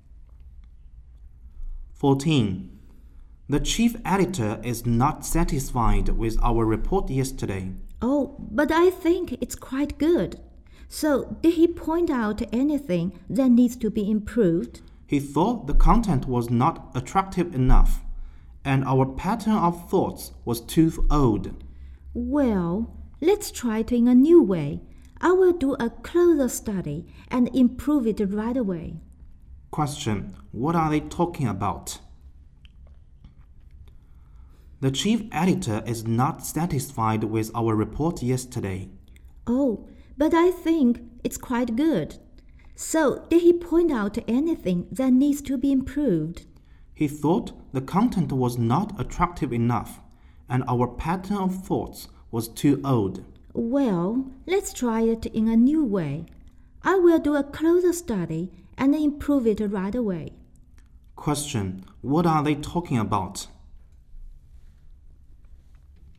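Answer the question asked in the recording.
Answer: Their report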